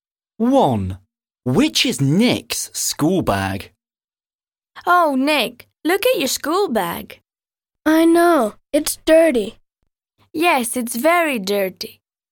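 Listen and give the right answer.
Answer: The dirty one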